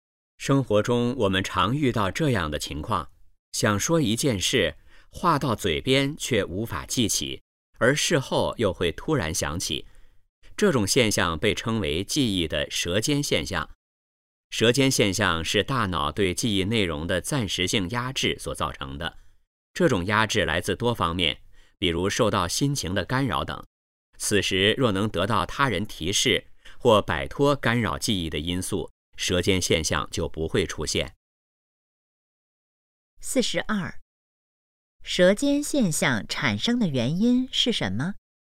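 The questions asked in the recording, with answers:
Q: 舌尖现象产生的原因是什么?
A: 大脑对记忆内容的暂时性压制

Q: 下列哪种办法能避免舌尖现象的产生?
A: 得到他人提示或摆脱干扰因素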